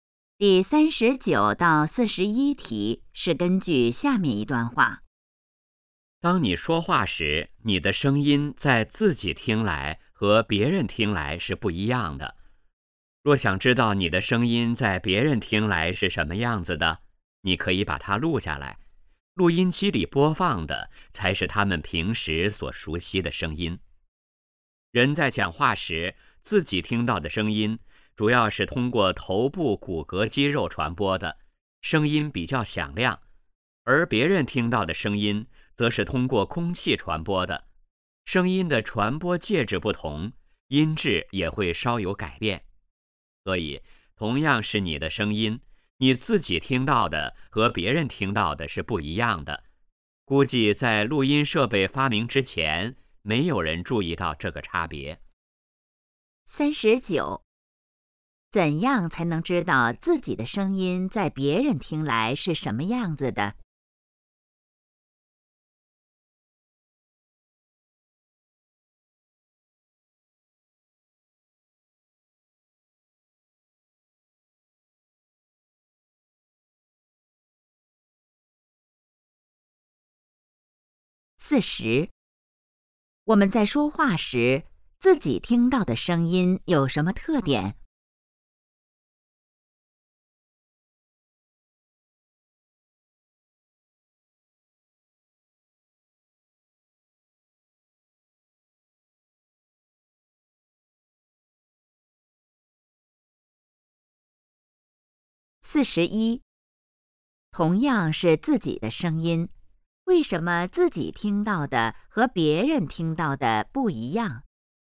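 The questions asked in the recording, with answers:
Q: 怎样才能知道自己的声音在别人听来是什么样子的?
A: 把它录下来

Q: 我们在说话时,自己听到的声音有什么特点?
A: 比较响亮

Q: 同样是自己的声音,为什么自己听到的和别人听到的不一样?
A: 声音的传播介质不同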